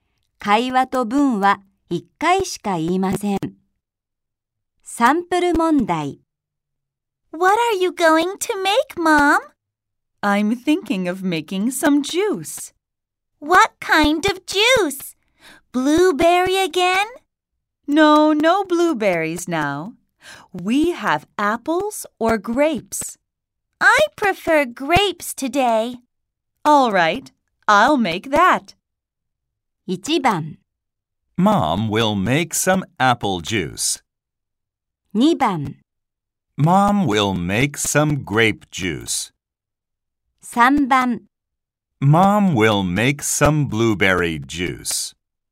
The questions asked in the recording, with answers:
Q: 3つの中から2人の話の内容に合っていると思う文の番号を1つ選びましょう。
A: 2番が答えだと分かります。